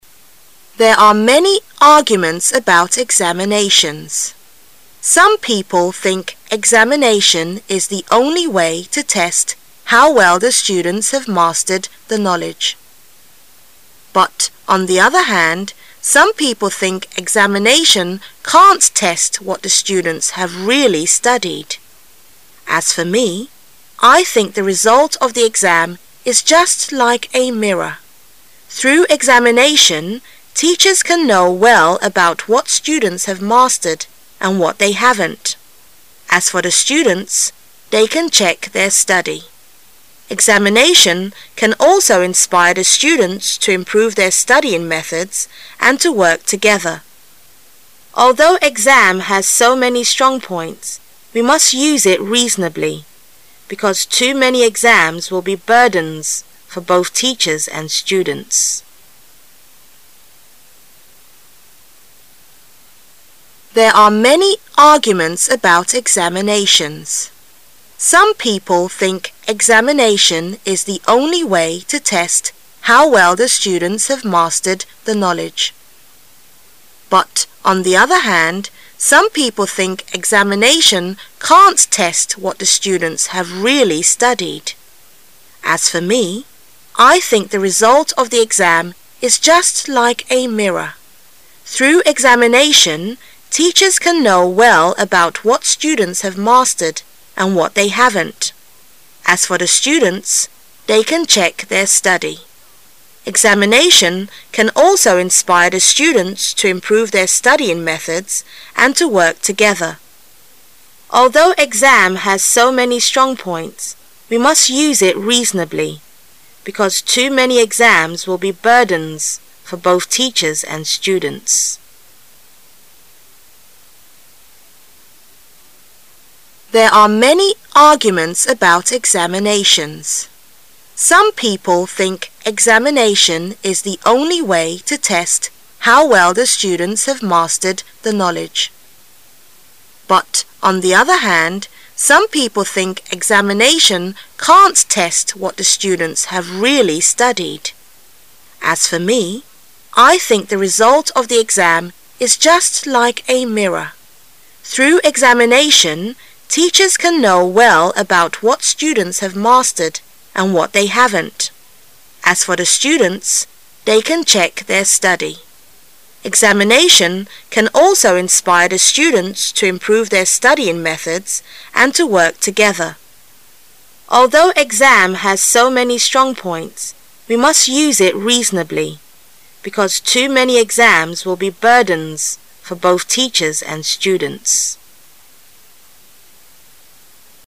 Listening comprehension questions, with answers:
Section C Directions: In this section you will hear a recorded short passage. The passage is printed in the test paper, but with some words or phrases missing. The passage will be read three times. During the second reading, you are required to put the missing words or phrases on the Answer Sheet in order of the numbered blanks according to what you hear. The third reading is for you to check your writing.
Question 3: As for me, I think the result of the exam is just like 3 .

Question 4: Examination can also inspire the students to 4 their studying methods and to work together.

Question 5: Although exam has so many 5 , we must use it reasonably, because too many exams will be burdens for both teachers and students.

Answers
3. a mirror
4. improve
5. strong points

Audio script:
[解析] 11-15 There are many arguments about examinations. Some people think examination is the only way to test how well the students have mastered the knowledge. But on the other hand, some people think examination can't test what the students have really studied. As for me, I think the result of the exam is just like a mirror. Through examination, teachers can know well about what students have mastered and what they haven ' t. As for the students, they can check their study. Examination can also inspire the students to improve their studying methods and to work together. Although exam has so many strong points, we must use it reasonably, because too many exams will be burdens for both teachers and students.